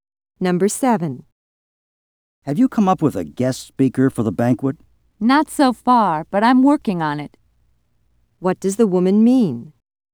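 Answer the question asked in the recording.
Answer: She hasn't found a guest speaker yet but is still trying.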